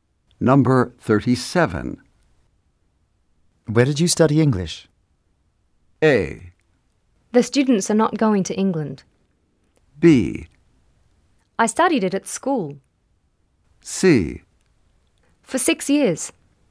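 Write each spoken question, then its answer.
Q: Where did you study English?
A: B: I studied it at school.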